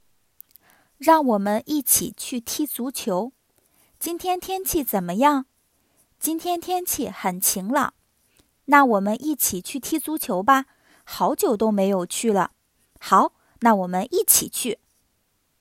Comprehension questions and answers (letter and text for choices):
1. 今天天气怎么样?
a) 天气不好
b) 天气太冷了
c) 天气晴朗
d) 天气下雪了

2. 他们会做什么运动?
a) 高尔夫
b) 篮球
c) 足球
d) 乒乓球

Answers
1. c) 天气晴朗
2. c) 足球

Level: HSK 1